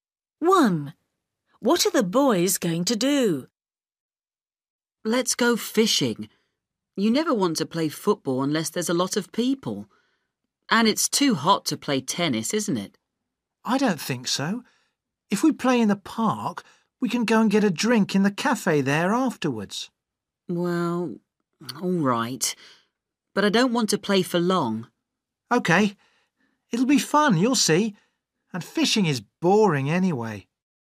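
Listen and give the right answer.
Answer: play tennis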